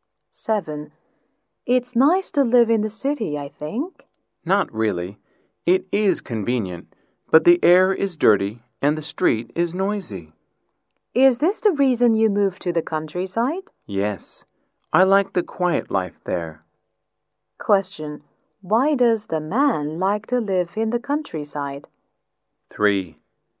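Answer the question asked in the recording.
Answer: He likes the quiet life there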